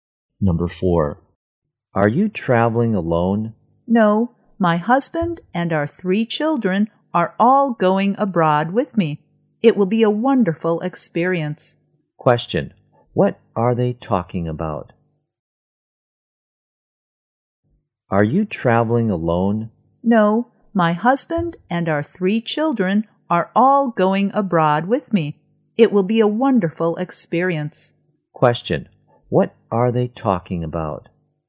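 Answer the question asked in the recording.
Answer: A family trip abroad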